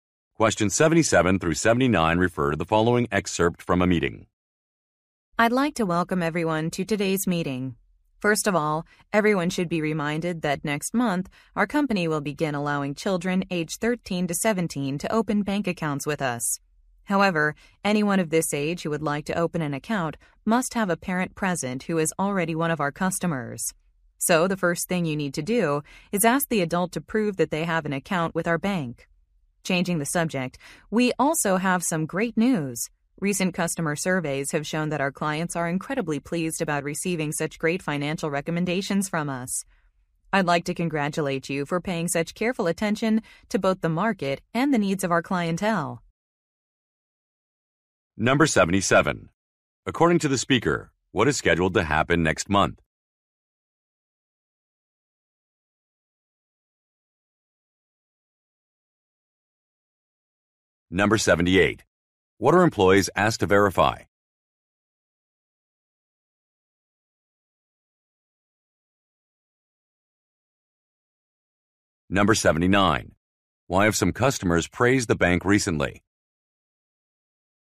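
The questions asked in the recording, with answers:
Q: According to the speaker, what is scheduled to happen next month?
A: Children aged 13 to 17 can open bank accounts

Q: What are employees asked to verify?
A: That the parent already has an account with the bank

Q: Why have some customers praised the bank recently?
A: For its good financial recommendations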